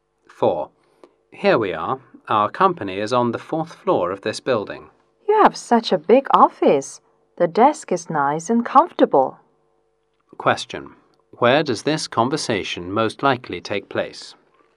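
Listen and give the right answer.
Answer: In the company's office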